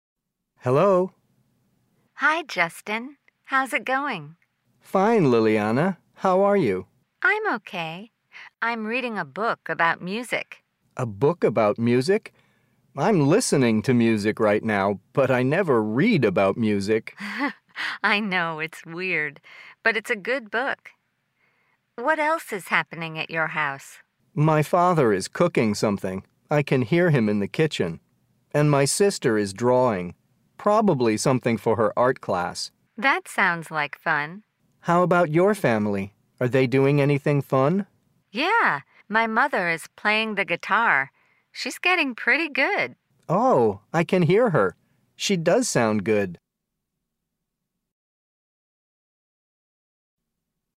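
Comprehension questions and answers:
Listen. Then choose the correct answers. TRUE OR FALSE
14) The woman's mother is playing the guitar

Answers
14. False

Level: Eleventh Grade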